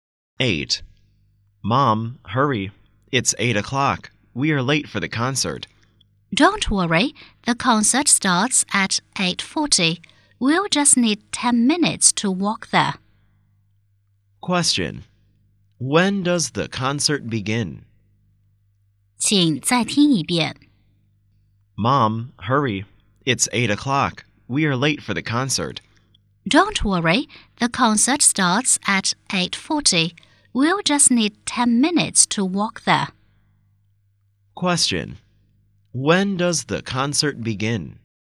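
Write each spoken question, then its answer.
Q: When does the concert begin?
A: At 8:40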